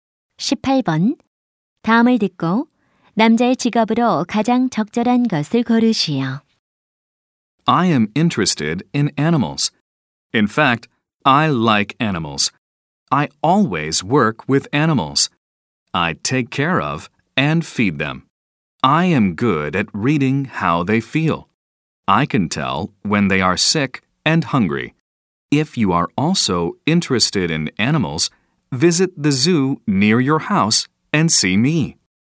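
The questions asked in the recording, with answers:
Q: 다음을 듣고 남자의 직업으로 가장 적절한 것을 고르시오.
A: 동물원 사육사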